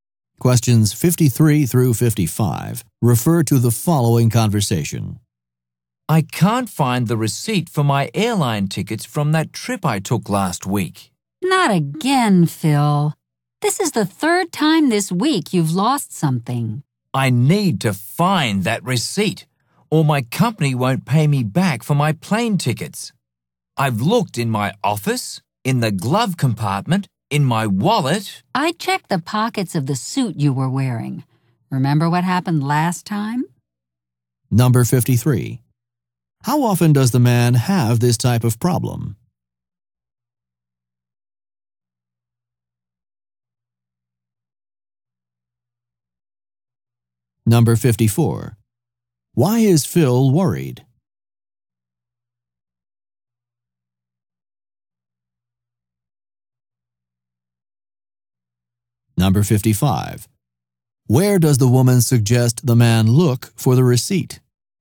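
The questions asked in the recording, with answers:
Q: How often does the man have this type of problem?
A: Often; it's the third time this week

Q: Why is Phil worried?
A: His company won't pay him back for his plane tickets without the receipt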